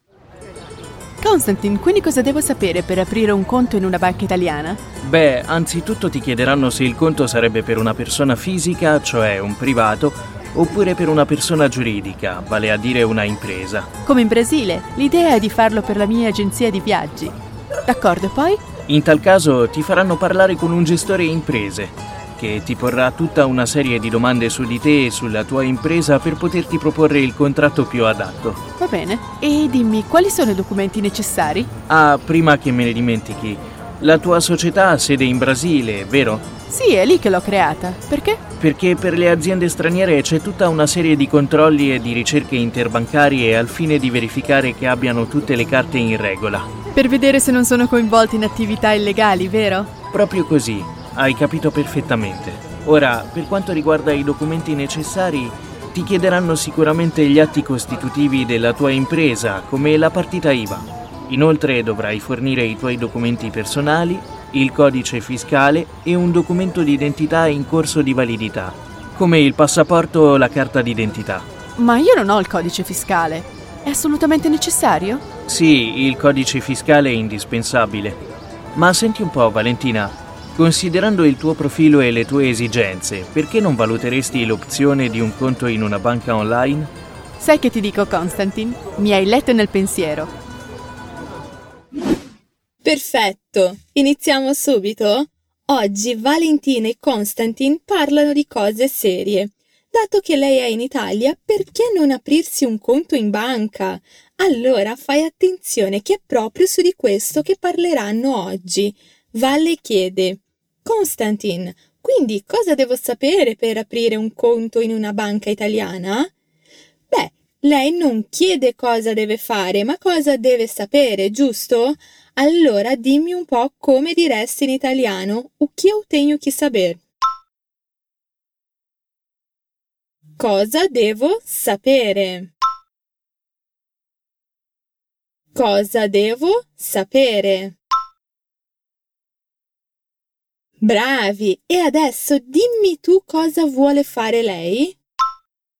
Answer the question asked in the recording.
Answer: Aprire un conto in una banca italiana.